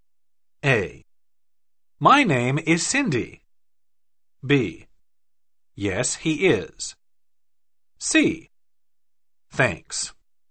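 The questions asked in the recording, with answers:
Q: Is Mr. Wong in?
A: B: Yes, he is.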